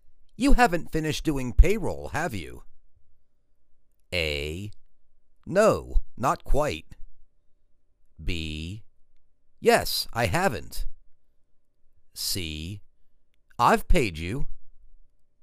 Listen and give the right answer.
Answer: No, not quite.